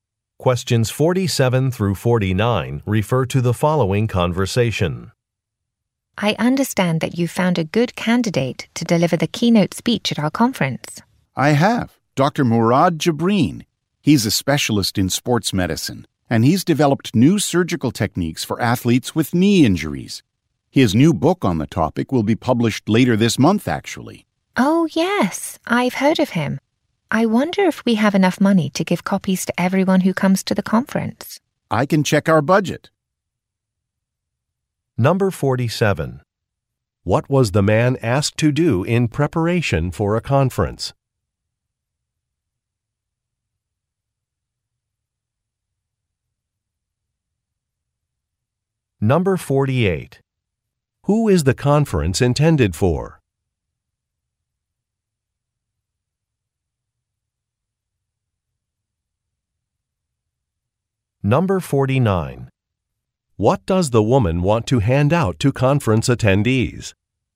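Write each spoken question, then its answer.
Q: What was the man asked to do in preparation for a conference?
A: Find a keynote speaker

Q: What does the woman want to hand out to conference attendees?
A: Copies of the speaker's book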